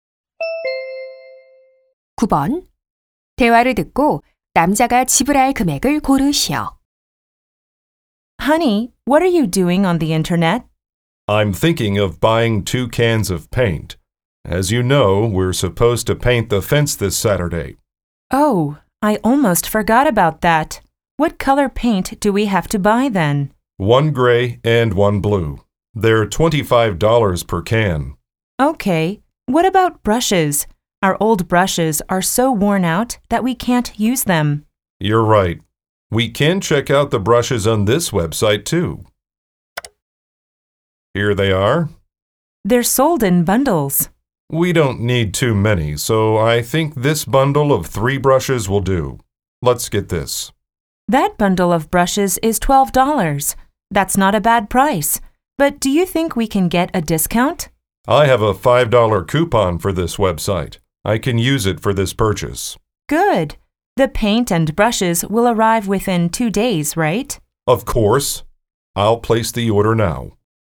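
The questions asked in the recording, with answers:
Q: 대화를 듣고 남자가 지불할 금액을 고르시오.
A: 57달러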